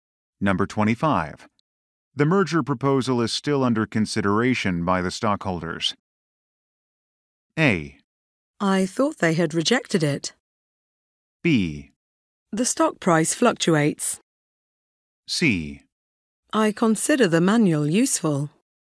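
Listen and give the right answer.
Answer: A: I thought they had rejected it.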